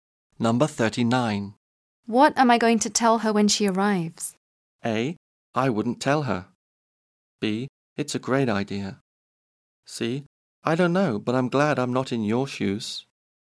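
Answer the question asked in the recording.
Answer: C: I don't know, but I'm glad I'm not in your shoes.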